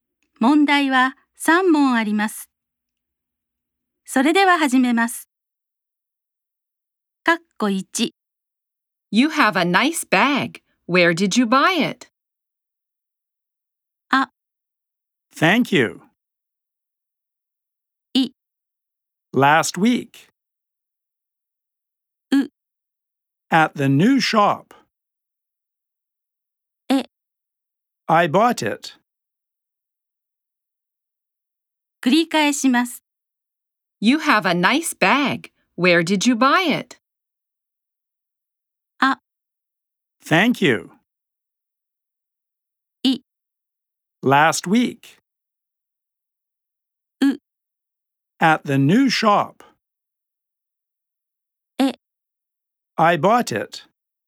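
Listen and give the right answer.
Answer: う: At the new shop.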